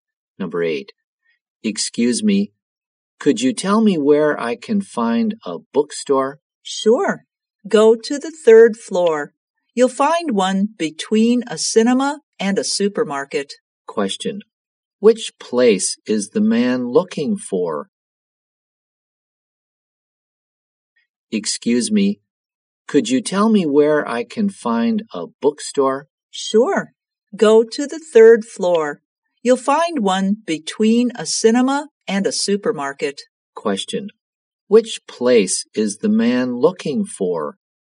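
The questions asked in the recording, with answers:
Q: Which place is the man looking for?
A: A bookstore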